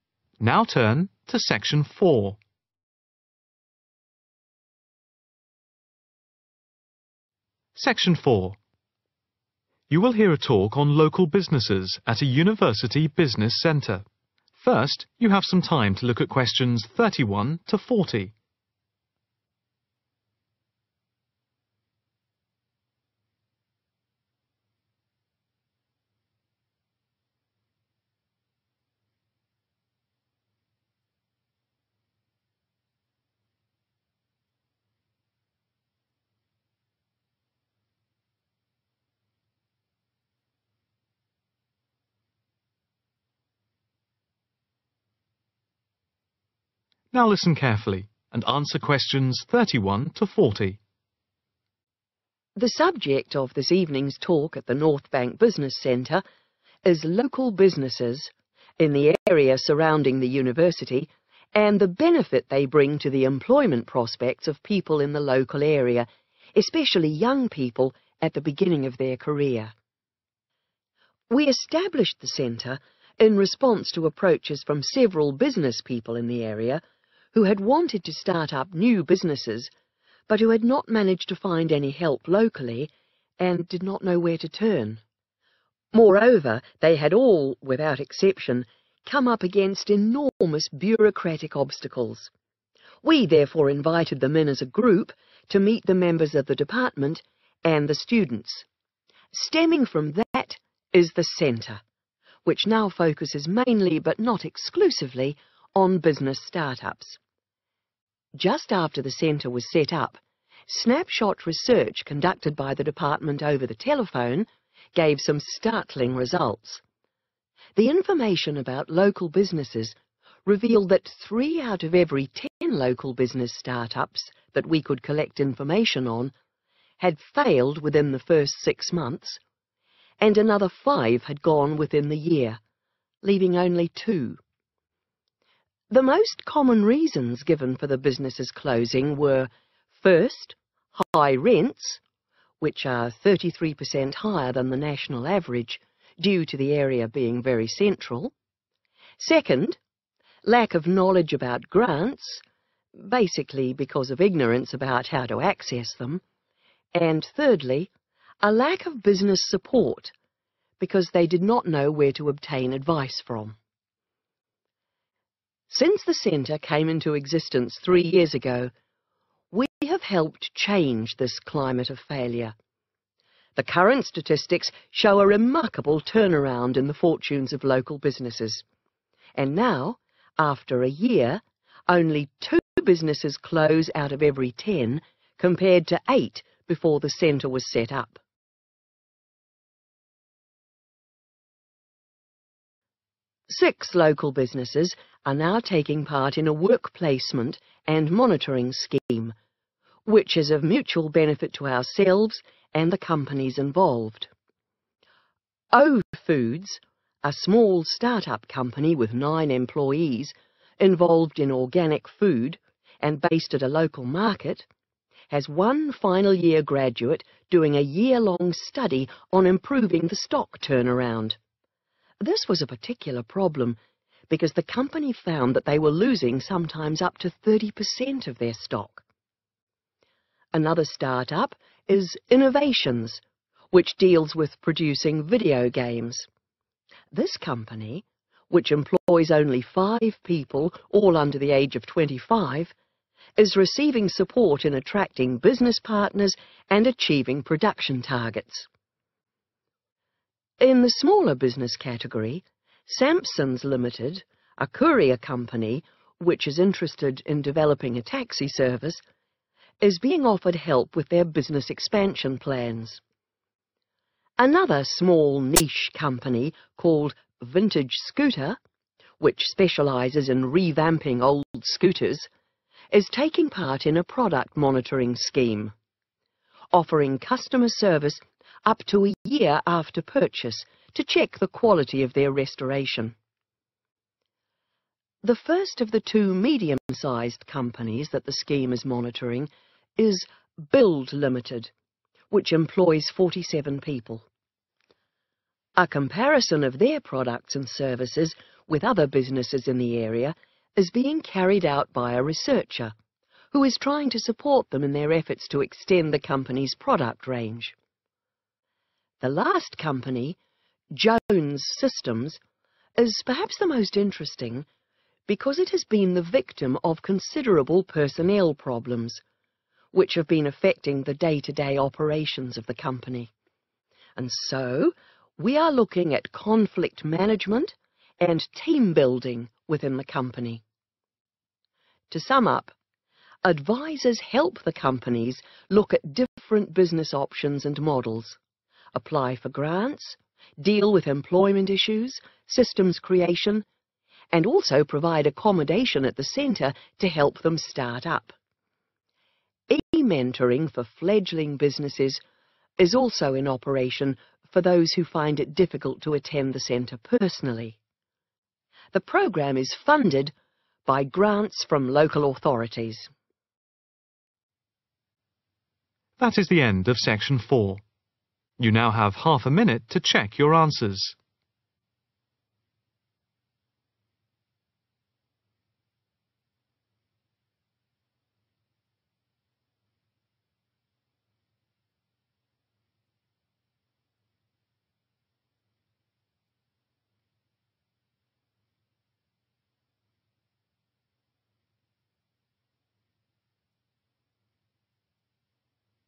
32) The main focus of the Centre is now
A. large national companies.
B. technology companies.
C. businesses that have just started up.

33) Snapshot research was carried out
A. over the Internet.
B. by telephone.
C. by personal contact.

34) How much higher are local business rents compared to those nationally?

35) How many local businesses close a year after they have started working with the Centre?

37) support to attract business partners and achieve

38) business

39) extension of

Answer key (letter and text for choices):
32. C. businesses that have just started up.
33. B. by telephone.
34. 33/thirty-three %/per cent/percent
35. 2/two
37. production targets
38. expansion plans
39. product range